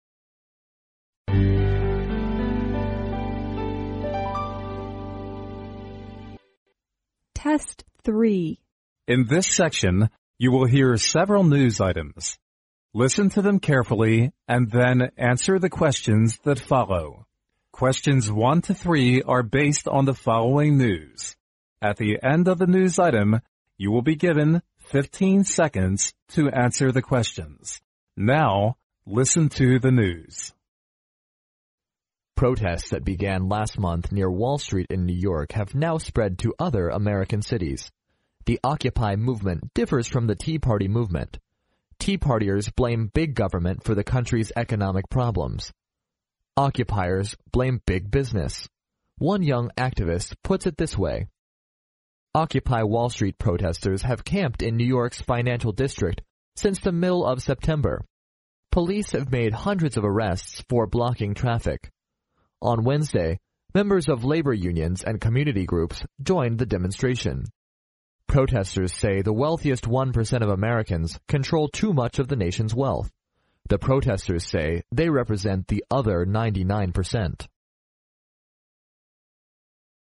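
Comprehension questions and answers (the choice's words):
Now listen to the news.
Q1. According to the news item, the Occupy movement condemns the country's _____.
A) big labor union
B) big government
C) big business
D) big police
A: big business

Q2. Why did the police arrest hundreds of protesters?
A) Because they blocked the traffic.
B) Because they occupied New York.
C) Because they clashed with community groups.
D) Because they controlled too much wealth.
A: Because they blocked the traffic.

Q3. Which of the following statements is INCORRECT?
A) The Occupy movement has now spread to other American cities.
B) The protesters have camped in New York's financial district.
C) Members of labor unions and community groups joined the movement.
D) The protesters represent the wealthiest ninety-nine percent of Americans.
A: The protesters represent the wealthiest ninety-nine percent of Americans.

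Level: 英语专业四级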